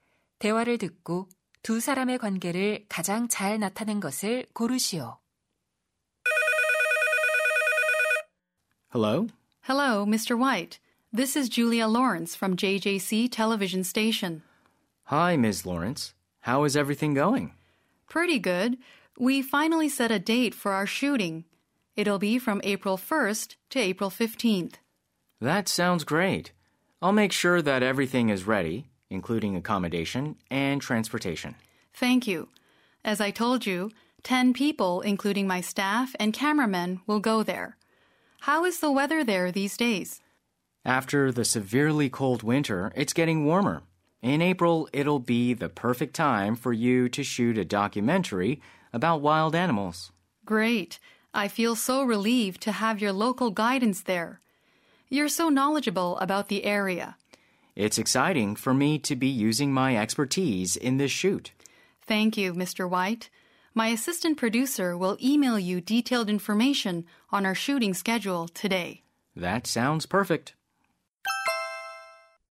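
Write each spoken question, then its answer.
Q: 대화를 듣고 두 사람의 관계를 가장 잘 나타낸 것을 고르시오.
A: 방송 프로듀서 - 현지 가이드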